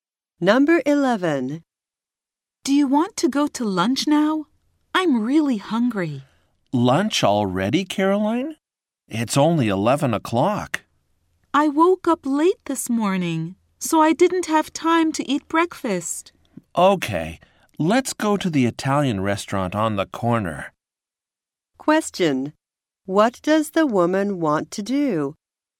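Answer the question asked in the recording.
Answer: Go to lunch now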